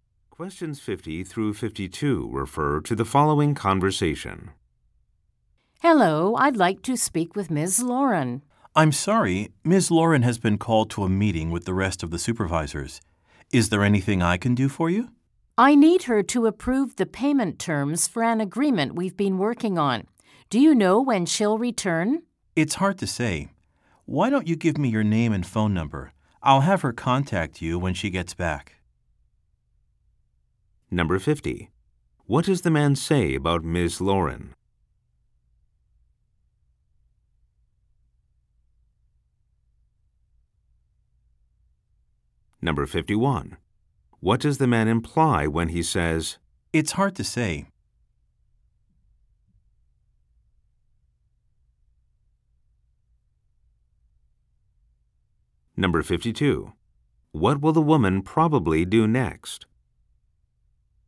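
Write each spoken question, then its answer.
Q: What does the man say about Ms.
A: She is in a meeting with the other supervisors

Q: What does the man imply when he says,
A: He doesn't know when she will return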